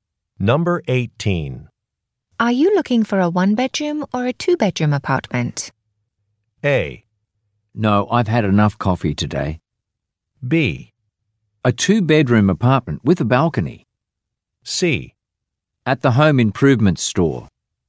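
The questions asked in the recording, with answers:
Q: Are you looking for a one-bedroom or a two-bedroom apartment?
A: B: A two-bedroom apartment with a balcony.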